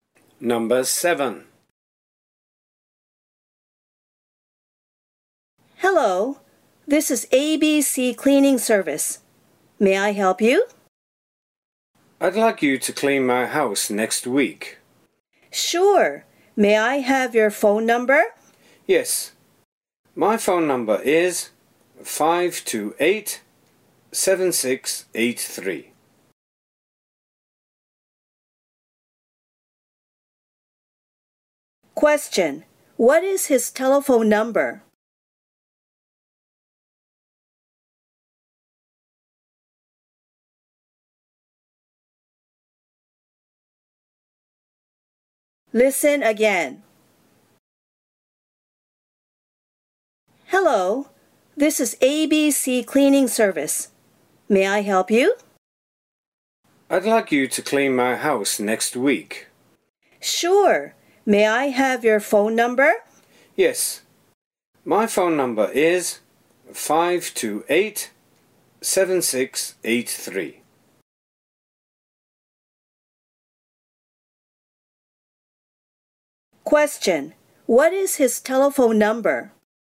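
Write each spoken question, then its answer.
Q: Question. What is his telephone number?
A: 528-7683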